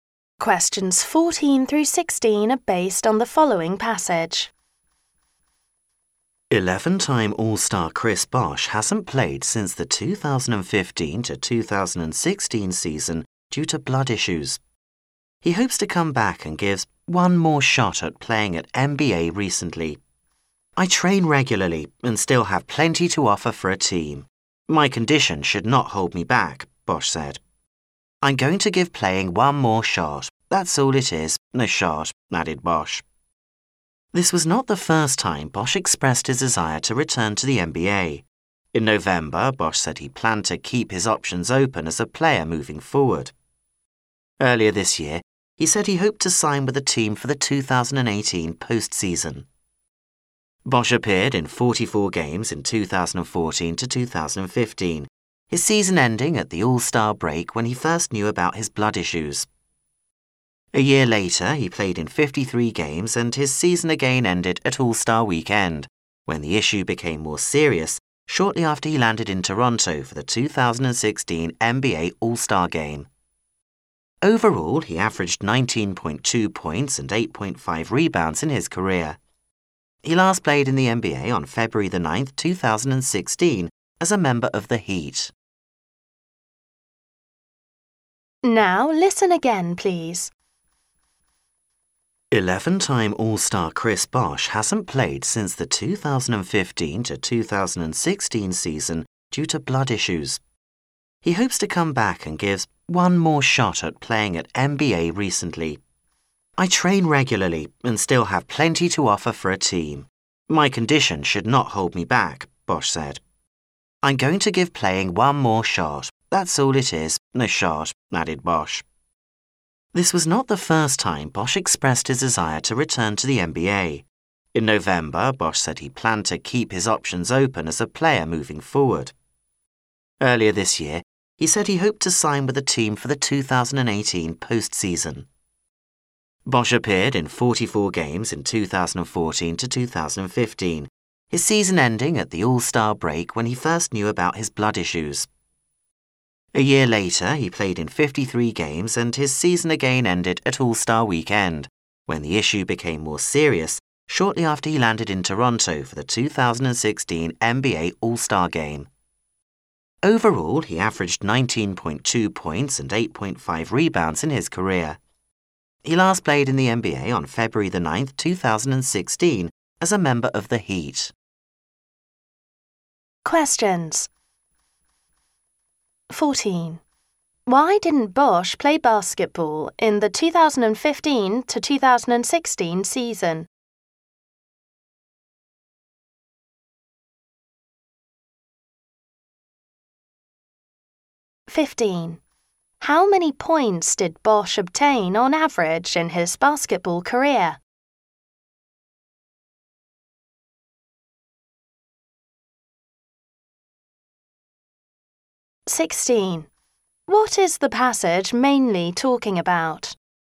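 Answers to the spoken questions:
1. Because of blood issues
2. 19.2 points
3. Chris Bosh hopes to return to the NBA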